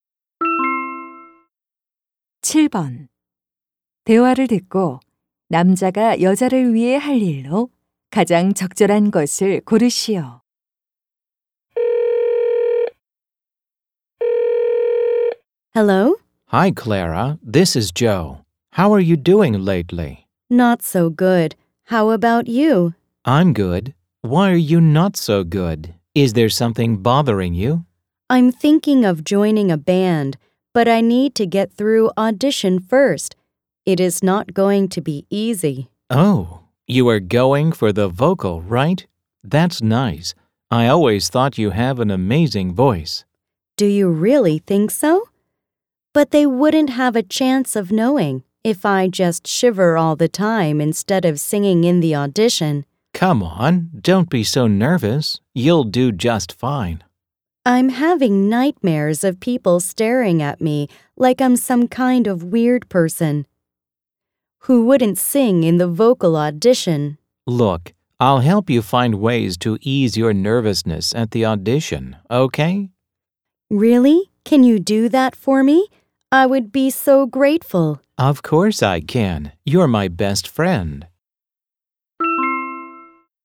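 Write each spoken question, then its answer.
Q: 대화를 듣고 남자가 여자를 위해 할 일로 가장 적절한 것을 고르시오.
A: 오디션에서 긴장을 푸는 방법 찾는 것 도와주기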